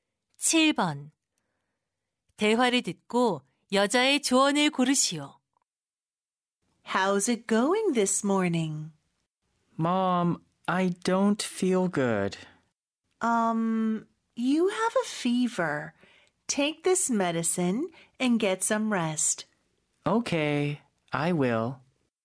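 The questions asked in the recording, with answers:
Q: 대화를 듣고 여자의 조언을 고르시오.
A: 약을 먹고 쉬어라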